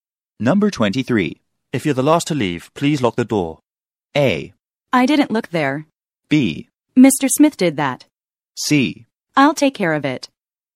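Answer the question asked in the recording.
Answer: C: I'll take care of it.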